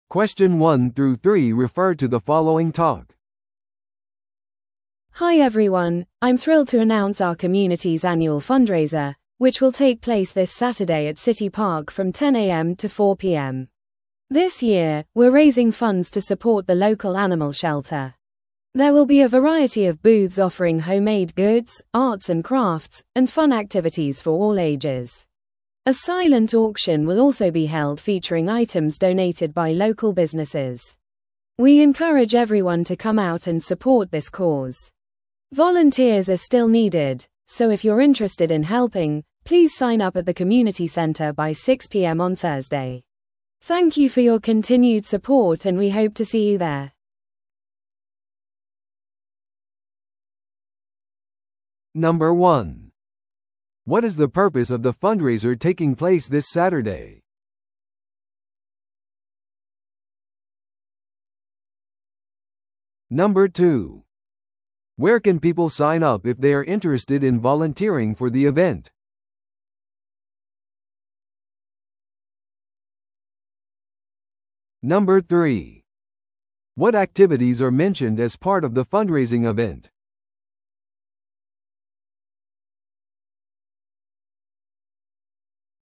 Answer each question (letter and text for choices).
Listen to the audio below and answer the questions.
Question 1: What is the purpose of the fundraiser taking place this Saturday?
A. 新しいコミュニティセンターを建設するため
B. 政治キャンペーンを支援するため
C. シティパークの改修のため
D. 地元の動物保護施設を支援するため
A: D. 地元の動物保護施設を支援するため

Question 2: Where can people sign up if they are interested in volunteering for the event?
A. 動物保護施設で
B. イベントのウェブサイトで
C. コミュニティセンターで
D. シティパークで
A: C. コミュニティセンターで

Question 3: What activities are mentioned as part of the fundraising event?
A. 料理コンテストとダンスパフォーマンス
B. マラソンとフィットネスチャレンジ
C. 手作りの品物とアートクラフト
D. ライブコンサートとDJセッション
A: C. 手作りの品物とアートクラフト

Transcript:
Hi everyone, I'm thrilled to announce our community's annual fundraiser, which will take place this Saturday at City Park from 10am to 4pm. This year, we're raising funds to support the local animal shelter. There will be a variety of booths offering homemade goods, arts and crafts, and fun activities for all ages. A silent auction will also be held featuring items donated by local businesses. We encourage everyone to come out and support this cause. Volunteers are still needed, so if you're interested in helping, please sign up at the community center by 6pm on Thursday. Thank you for your continued support and we hope to see you there!